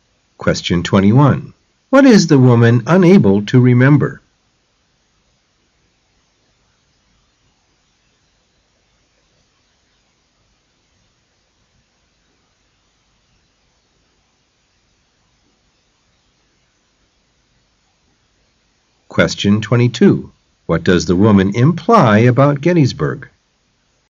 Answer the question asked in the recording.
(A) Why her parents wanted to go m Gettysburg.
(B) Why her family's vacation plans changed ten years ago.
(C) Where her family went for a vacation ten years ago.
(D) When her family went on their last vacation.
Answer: (B) Why her family's vacation plans changed ten years ago.